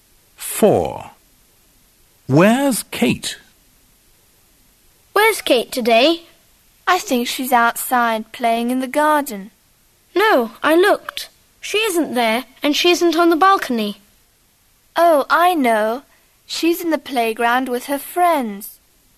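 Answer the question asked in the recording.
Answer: In the playground with her friends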